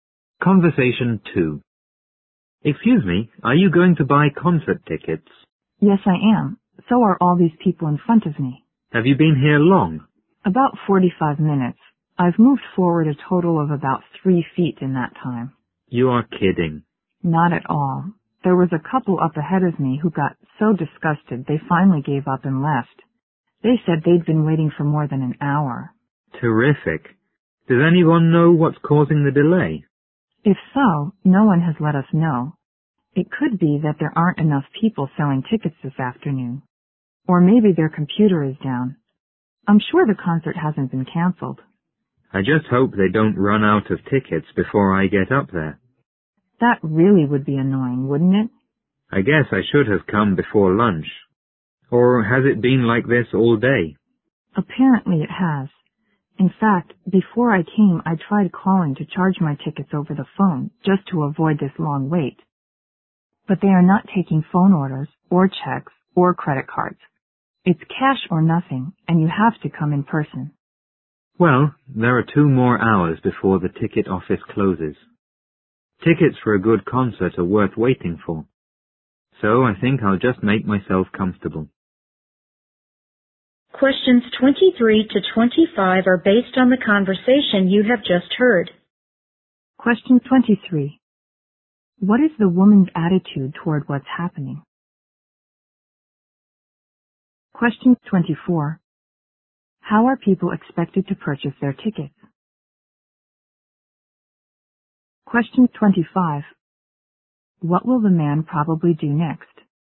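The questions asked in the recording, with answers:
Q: How are people expected to purchase their tickets?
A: In person with cash

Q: What will the man probably do next?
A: Keep waiting in line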